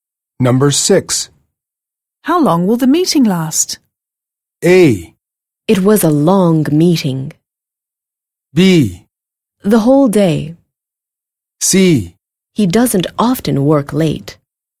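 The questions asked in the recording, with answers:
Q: How long will the meeting last?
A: B: The whole day.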